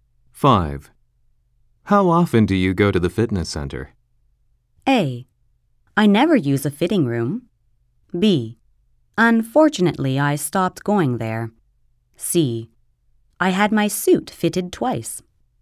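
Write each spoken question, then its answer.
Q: How often do you go to the fitness center?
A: B: Unfortunately, I stopped going there.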